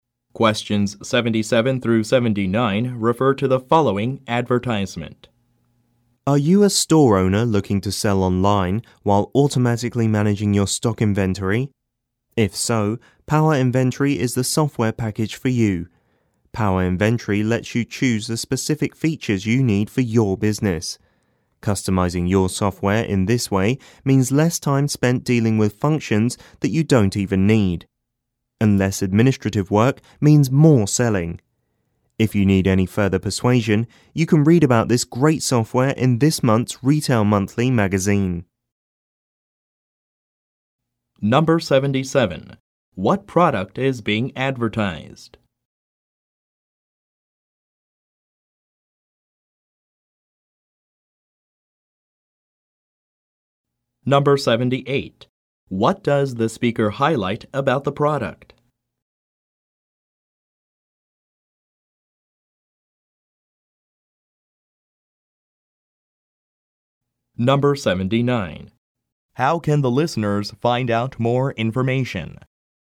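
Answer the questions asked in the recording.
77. Inventory management software
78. It can be customized with the specific features you need
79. By reading this month's Retail Monthly magazine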